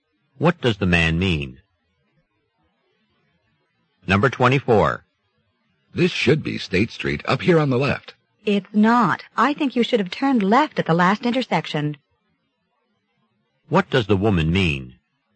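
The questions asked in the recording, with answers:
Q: What does the woman mean?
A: They missed the turn at the last intersection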